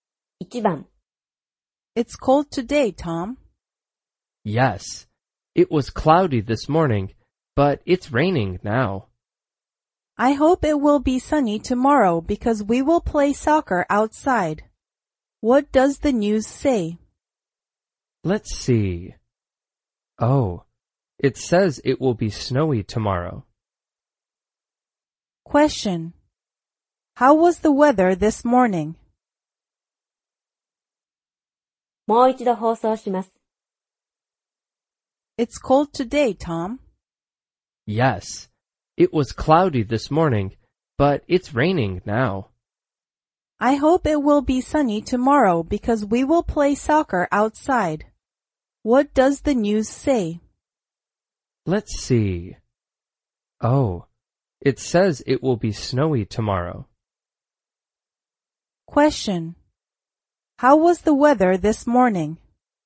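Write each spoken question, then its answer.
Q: How was the weather this morning?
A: It was cloudy.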